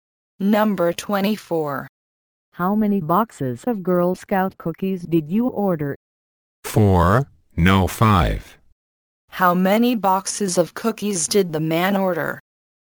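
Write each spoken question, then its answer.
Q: How many boxes of cookies did the man order?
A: Five.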